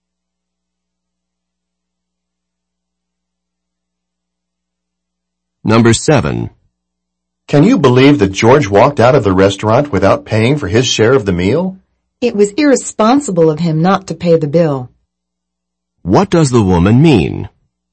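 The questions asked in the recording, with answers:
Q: What does the woman mean?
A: George acted irresponsibly by not paying.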